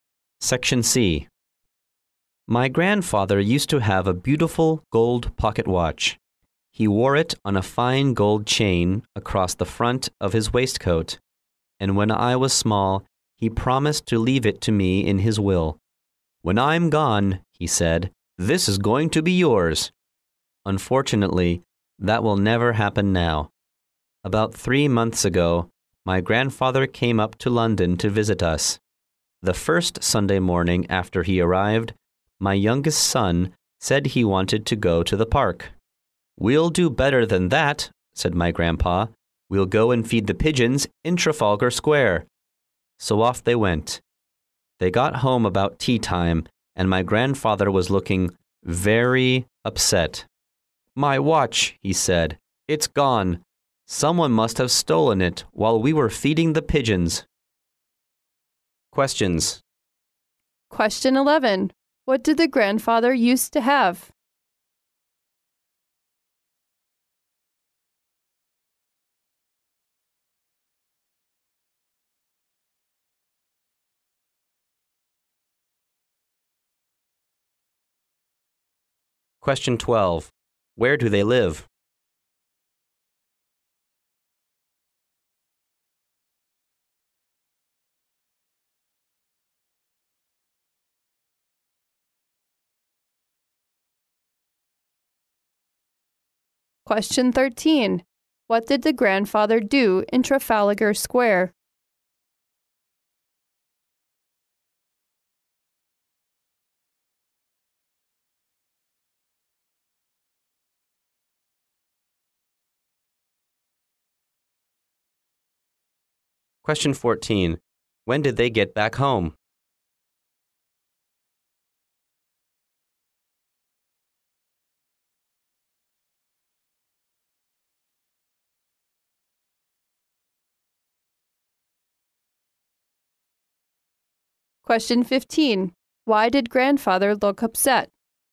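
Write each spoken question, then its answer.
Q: What did the grandfather used to have?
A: A beautiful gold pocket watch

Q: Where do they live?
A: In London

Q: What did the grandfather do in Trafalgar Square?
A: Fed the pigeons

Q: When did they get back home?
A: About tea time

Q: Why did Grandfather look upset?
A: His watch had been stolen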